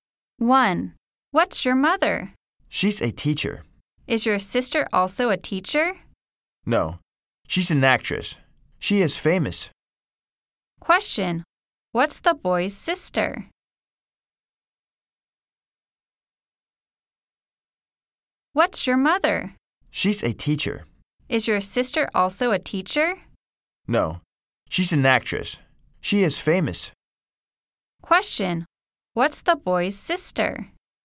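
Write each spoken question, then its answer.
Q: Question, what's the boy's sister?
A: She's a famous actress.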